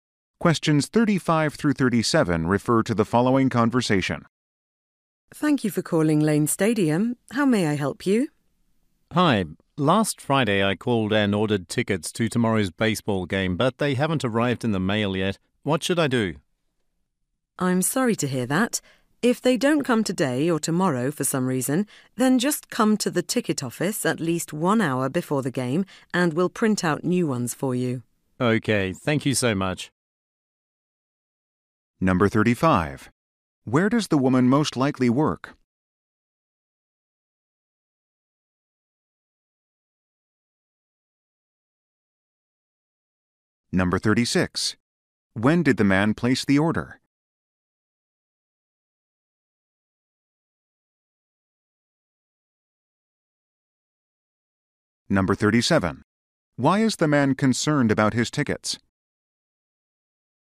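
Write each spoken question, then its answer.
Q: Where does the woman most likely work?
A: At Lane Stadium (ticket office)

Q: When did the man place the order?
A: Last Friday

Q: Why is the man concerned about his tickets?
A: They haven't arrived in the mail yet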